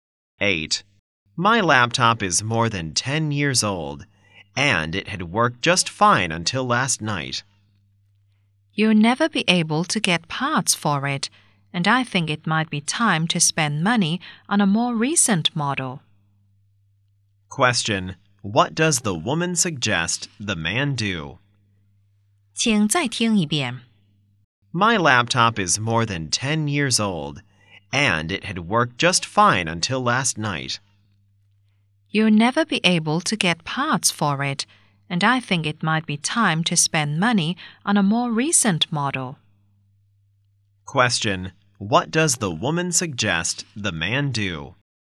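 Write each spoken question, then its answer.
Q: what does the woman suggest the man do?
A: Buy a new laptop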